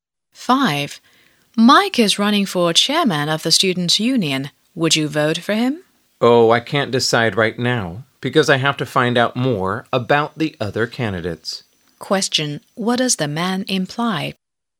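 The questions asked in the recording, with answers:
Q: What does the man imply?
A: He hasn't decided yet and wants to learn about the other candidates first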